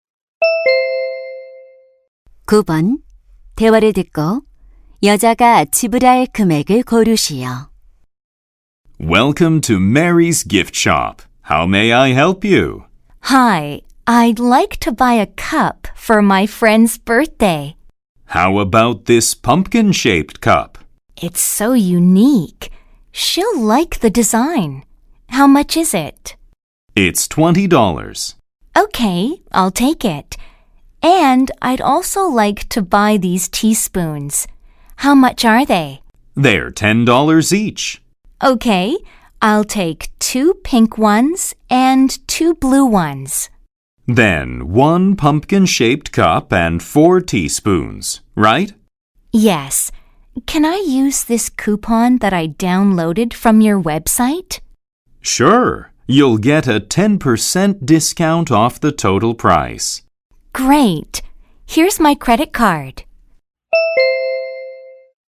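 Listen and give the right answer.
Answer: $54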